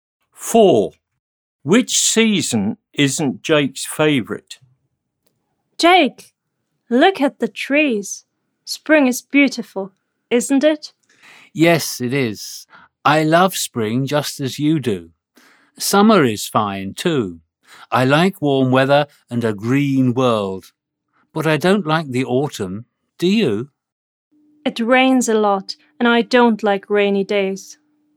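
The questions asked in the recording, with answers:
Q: Which season isn't Jake's favourite?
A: Autumn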